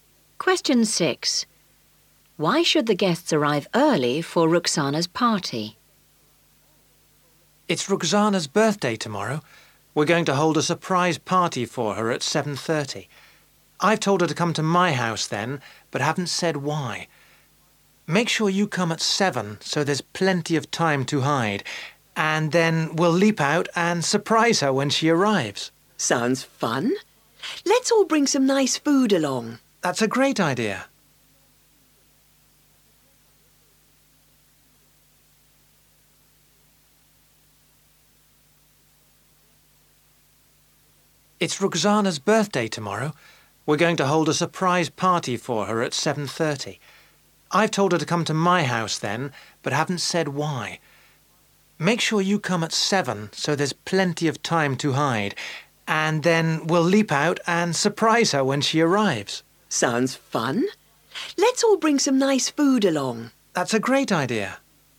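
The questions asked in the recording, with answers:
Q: Why should the guests arrive early for Roxana's party?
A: So there is plenty of time to hide (to surprise her)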